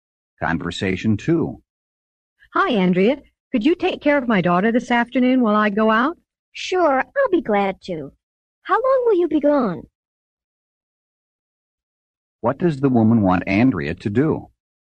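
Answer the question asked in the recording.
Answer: Take care of her daughter this afternoon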